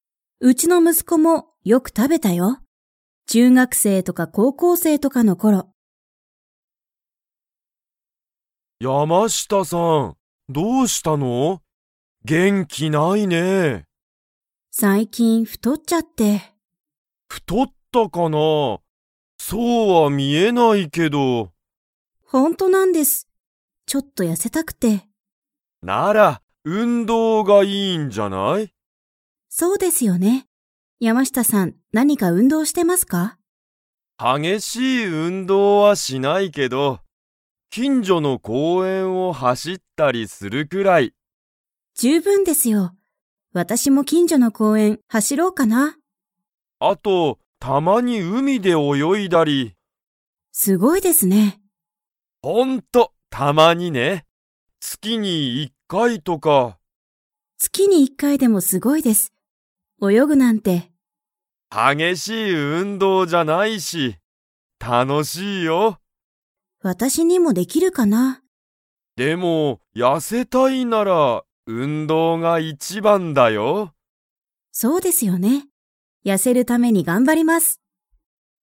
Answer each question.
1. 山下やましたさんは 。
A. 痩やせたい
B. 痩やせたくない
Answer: 痩やせたい

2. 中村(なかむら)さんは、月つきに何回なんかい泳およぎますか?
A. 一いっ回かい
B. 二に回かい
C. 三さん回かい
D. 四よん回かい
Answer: 一いっ回かい

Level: Level 4

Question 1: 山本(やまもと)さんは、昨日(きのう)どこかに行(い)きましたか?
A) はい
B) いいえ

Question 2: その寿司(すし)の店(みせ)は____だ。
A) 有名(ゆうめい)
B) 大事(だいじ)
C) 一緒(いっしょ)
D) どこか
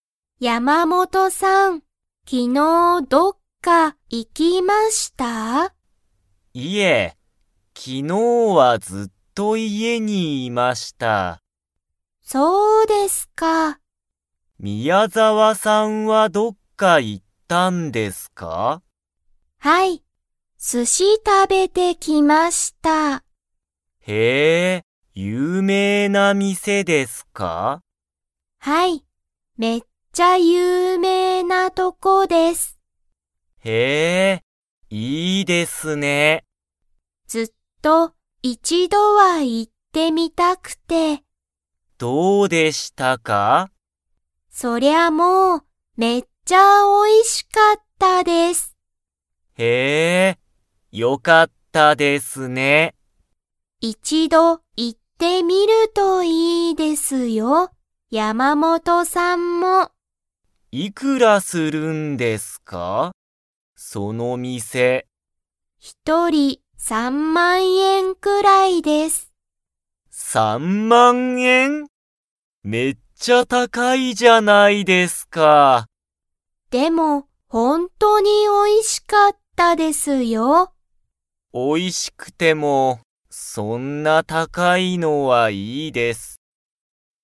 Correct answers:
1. いいえ
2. 有名(ゆうめい)

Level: Level 2

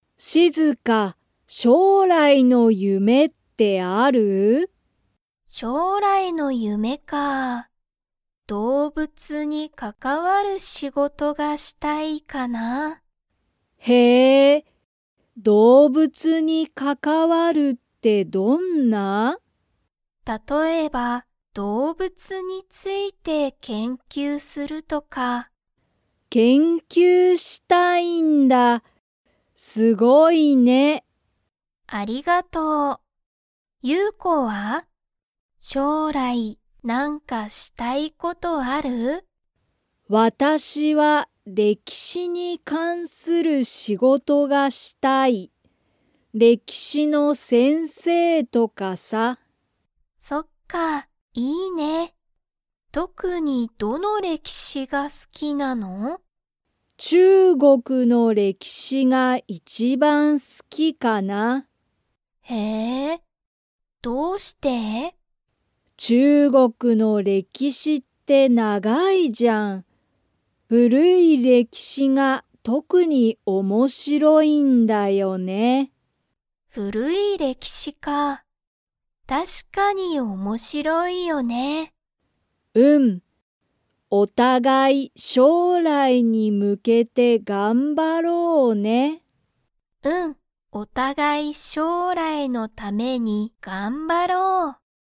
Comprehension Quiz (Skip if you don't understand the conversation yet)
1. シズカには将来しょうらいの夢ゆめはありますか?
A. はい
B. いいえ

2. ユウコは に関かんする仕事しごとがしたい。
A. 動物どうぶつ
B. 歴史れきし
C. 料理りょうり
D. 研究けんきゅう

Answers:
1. はい
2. 歴史れきし

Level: Level 3

